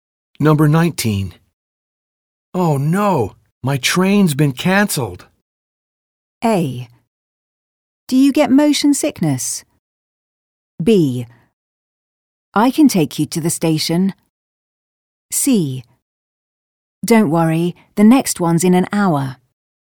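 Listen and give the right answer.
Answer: C: Don't worry, the next one's in an hour.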